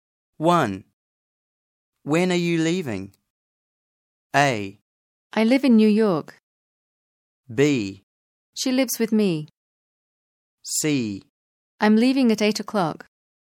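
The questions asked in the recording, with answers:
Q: When are you leaving?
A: C: I'm leaving at 8 o'clock.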